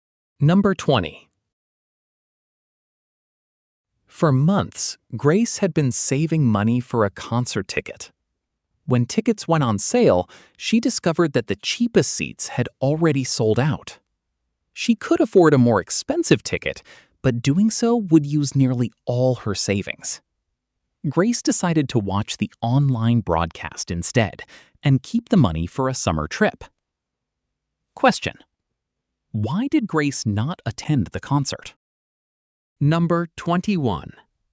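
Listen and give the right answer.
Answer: The cheap seats sold out and she wanted to save money for a summer trip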